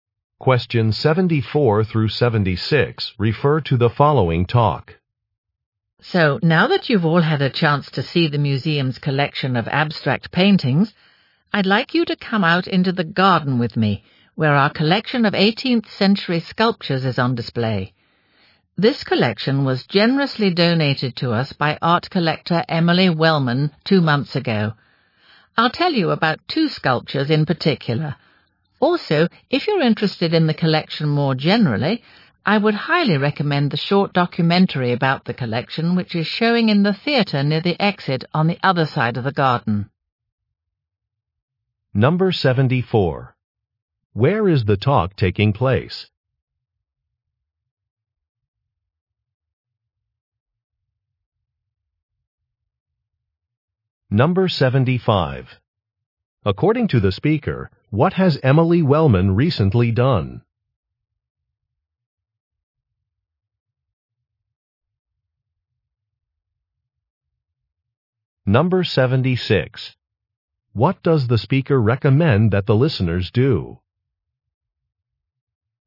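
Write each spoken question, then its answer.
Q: Where is the talk taking place?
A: At a museum

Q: According to the speaker, what has Emily Wellman recently done?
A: She donated a sculpture collection

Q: What does the speaker recommend that the listeners do?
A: Watch a short documentary about the collection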